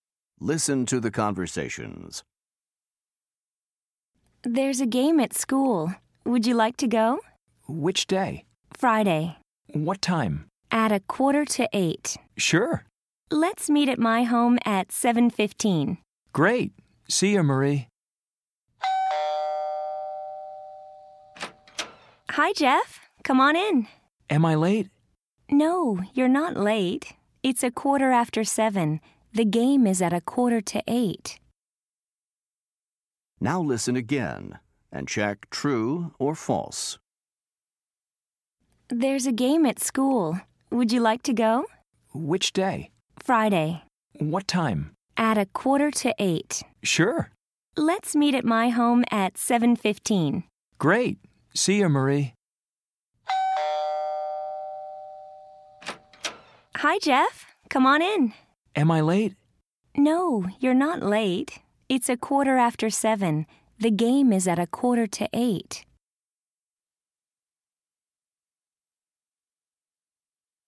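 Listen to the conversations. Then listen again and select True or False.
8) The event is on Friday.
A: True

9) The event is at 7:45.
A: True

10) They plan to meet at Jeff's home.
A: False

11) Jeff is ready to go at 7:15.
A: True

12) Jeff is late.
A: False

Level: Top Notch Fundamentals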